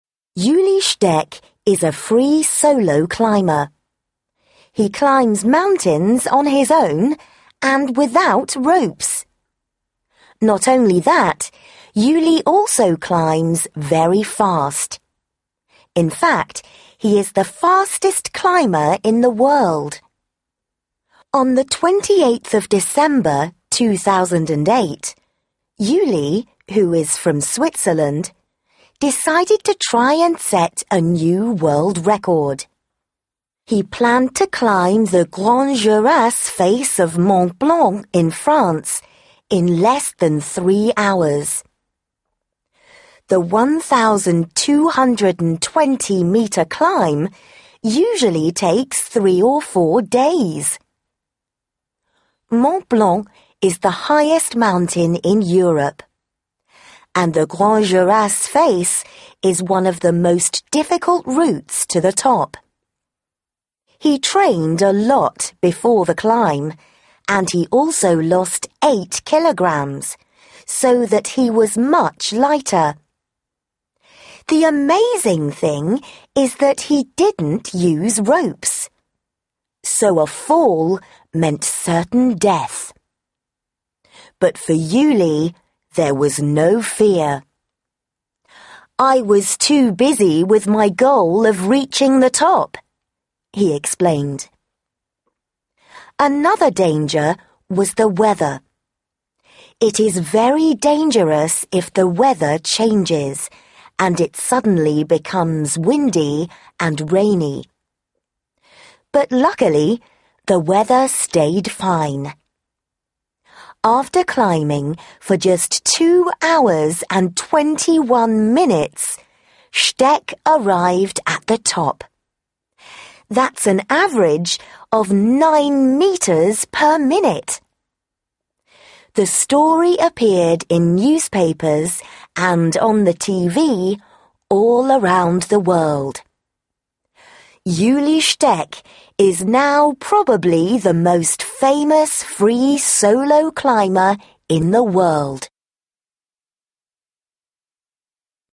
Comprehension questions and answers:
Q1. What nationality is Ueli Steck?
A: Swiss

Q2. How high is the Grandes Jorasses face?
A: 1,220 m

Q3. How much weight did he lose before the climb?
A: 8 kg

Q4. Why wasn't Steck afraid of falling?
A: Because he didn't think about it.

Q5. What record did he set?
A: The fastest climb to the top of Mont Blanc.

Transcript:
Ueli Steck is a free solo climber. He climbs mountains on his own, and without ropes! Not only that, Ueli also climbs very fast. In fact, he is the fastest climber in the world. On 28 December 2008, Ueli, who is from Switzerland, decided to try and set a new world record. He planned to climb the Grandes Jorasses face of Mont Blanc in France, in less than three hours. The 1,220 metre climb usually takes three or four days! Mont Blanc is the highest mountain in Europe, and the Grandes Jorasses face is one of the most difficult routes to the top. He trained a lot before the climb and he also lost eight kilogrammes, so that he was much lighter. The amazing thing is that he didn't use ropes. So a fall meant certain death. But for Ueli, there was no fear 'I was too busy with goal of reaching the top,' he explained. Another danger was the weather. It is very dangerous if the weather changes and it suddenly becomes windy and rainy. But luckily, the weather stayed fine. After climbing for just 2 hours and 21 minutes, Steck arrived at the top. That's an average of nine metres per minute! The story appeared in newspapers and on the TV all around the world. Ueli Steck is now probably the most famous free solo climber in the world!